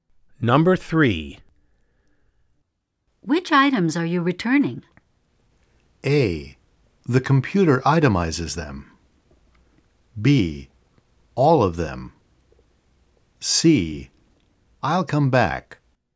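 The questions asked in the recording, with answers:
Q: Which items are you returning?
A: B: All of them.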